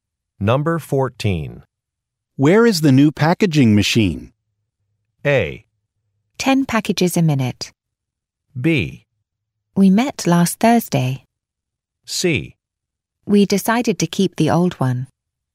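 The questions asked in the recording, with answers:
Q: Where is the new packaging machine?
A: C: We decided to keep the old one.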